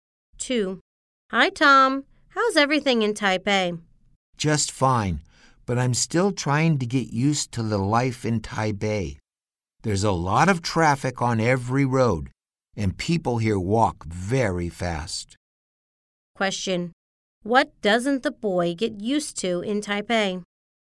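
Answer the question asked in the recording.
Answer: The life in Taipei (heavy traffic and people walking fast)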